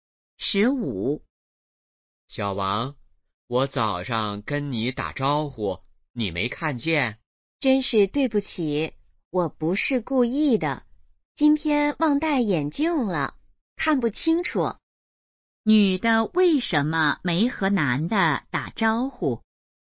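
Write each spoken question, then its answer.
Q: 女的为什么没和男的打招呼?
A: 忘戴眼镜,看不清楚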